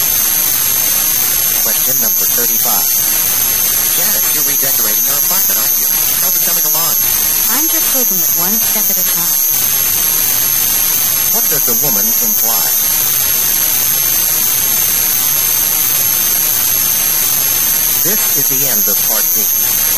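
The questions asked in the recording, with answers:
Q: What does the woman imply?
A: She is redecorating slowly, gradually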